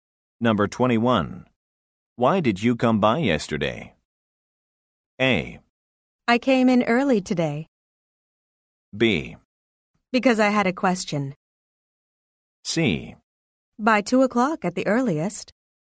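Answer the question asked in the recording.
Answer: B: Because I had a question.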